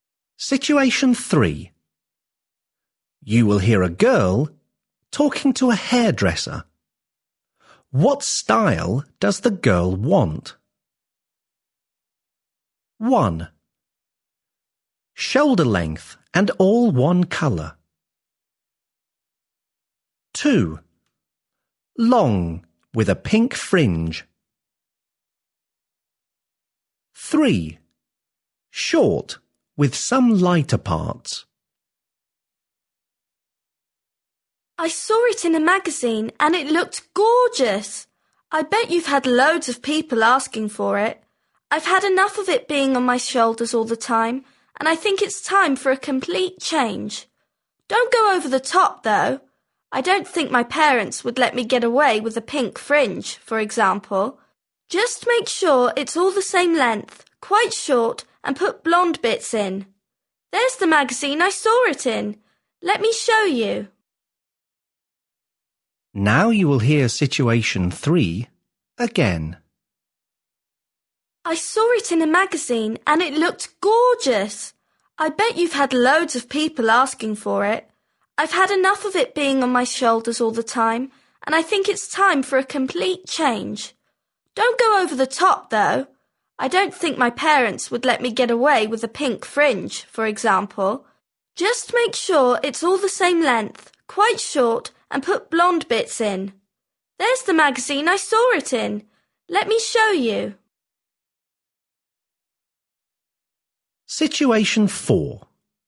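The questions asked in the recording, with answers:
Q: What style does the girl want?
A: 3: Short with some lighter parts.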